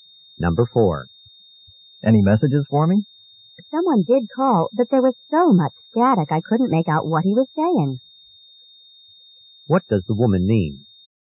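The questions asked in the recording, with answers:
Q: What does the woman mean?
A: Someone called, but she couldn't understand the message because of static.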